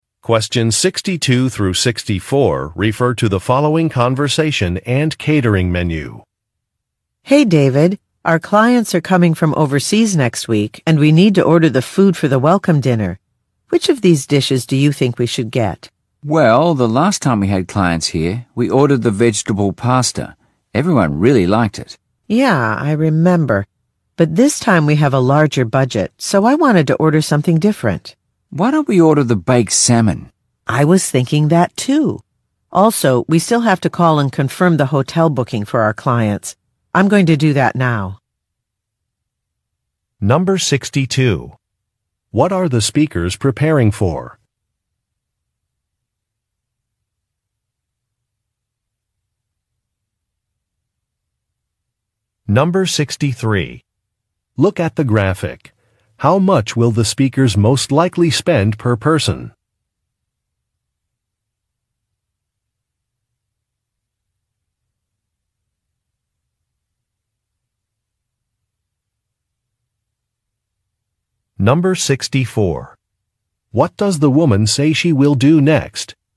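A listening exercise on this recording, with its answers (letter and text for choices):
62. What are the speakers preparing for?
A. A job fair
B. A client visit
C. A training session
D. A retirement dinner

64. What does the woman say she will do next?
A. Prepare an itinerary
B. Buy some train passes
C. Visit some restaurants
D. Confirm a hotel reservation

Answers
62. B. A client visit
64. D. Confirm a hotel reservation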